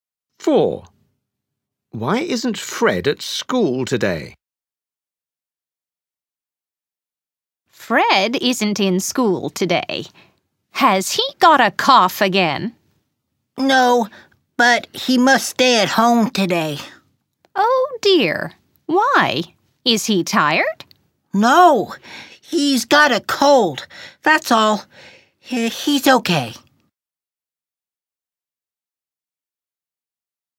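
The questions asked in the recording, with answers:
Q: Why isn't Fred at school today?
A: he's got a cold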